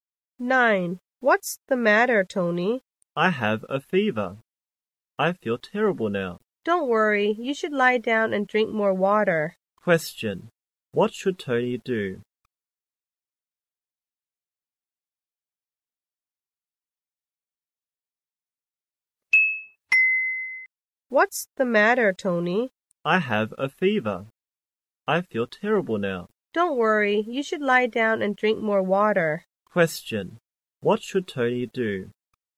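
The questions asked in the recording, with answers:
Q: What should Tony do?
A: Lie down and drink more water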